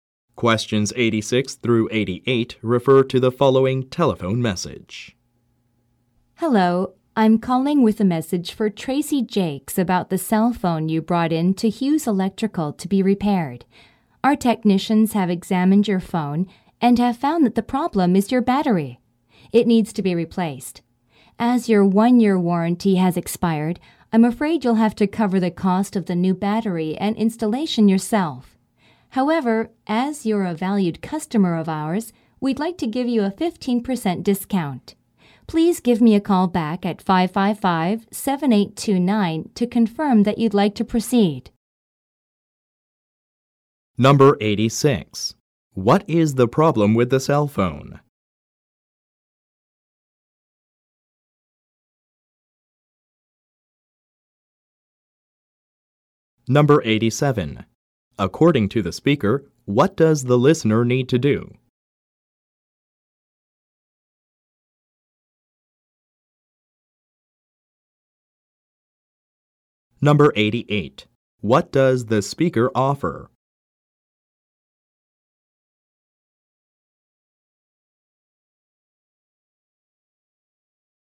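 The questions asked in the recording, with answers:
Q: What is the problem with the cell phone?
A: The battery needs to be replaced.

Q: What does the speaker offer?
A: A 15% discount.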